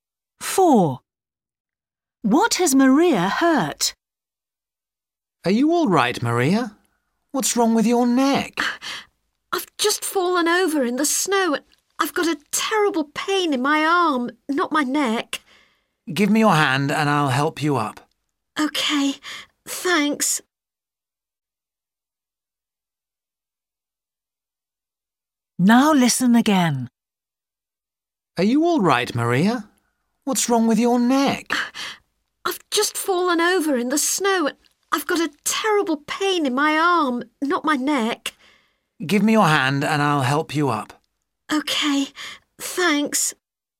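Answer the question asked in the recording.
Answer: Her arm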